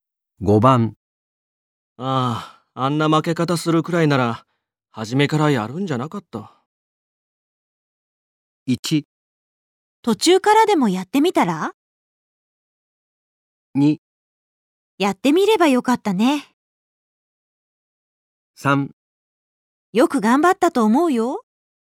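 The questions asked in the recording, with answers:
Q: ああ、あんな負け方するくらいなら、初めからやるんじゃなかった。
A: 3: よく頑張ったと思うよ。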